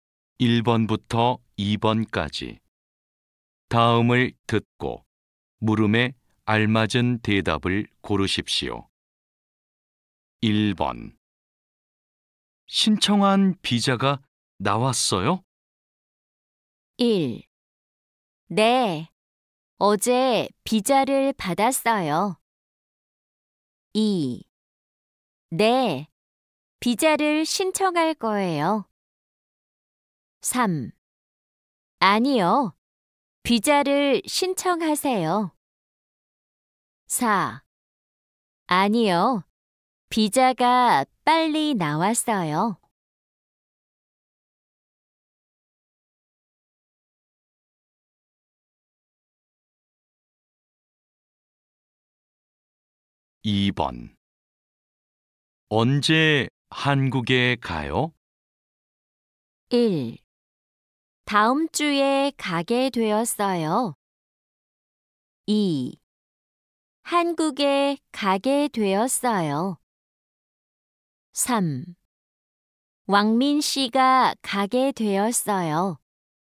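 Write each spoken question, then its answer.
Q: 신청한 비자가 나왔어요?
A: 1: 네, 어제 비자를 받았어요.

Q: 언제 한국에 가요?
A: 1: 다음 주에 가게 되었어요.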